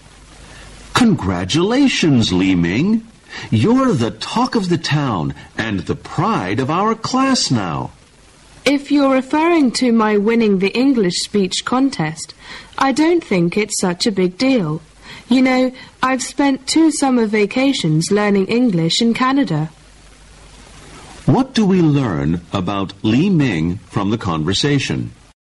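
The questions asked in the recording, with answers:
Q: What do we learn about Li Ming from the conversation?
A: He won the English speech contest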